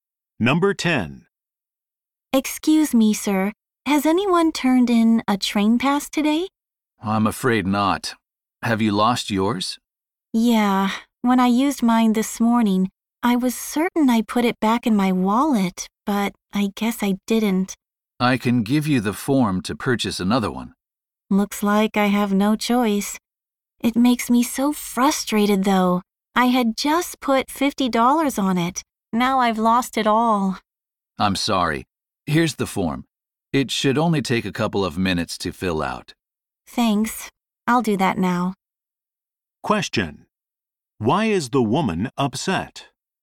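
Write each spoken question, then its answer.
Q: Why is the woman upset?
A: She lost her train pass with $50 on it.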